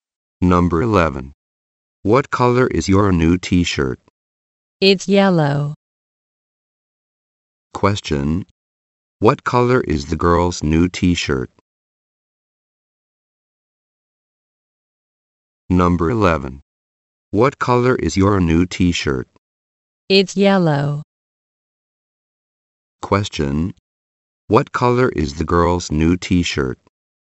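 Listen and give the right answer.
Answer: Yellow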